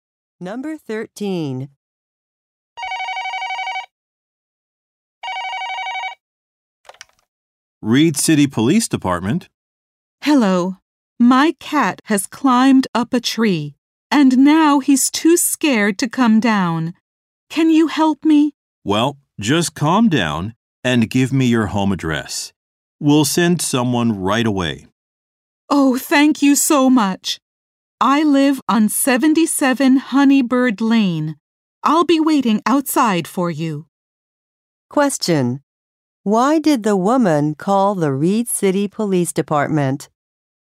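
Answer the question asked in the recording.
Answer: Her cat is stuck up a tree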